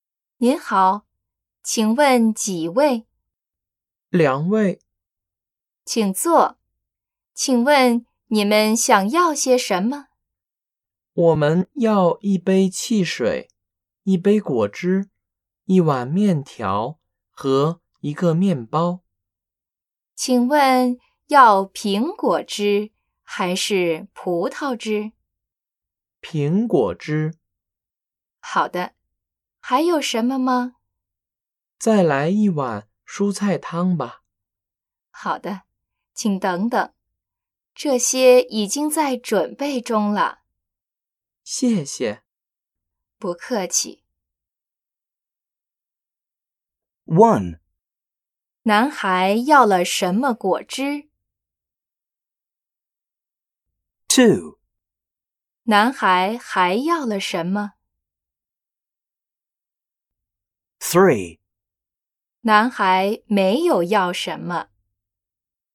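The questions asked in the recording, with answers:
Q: 男孩要了什么果汁?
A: 苹果汁

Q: 男孩还要了什么?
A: 一碗蔬菜汤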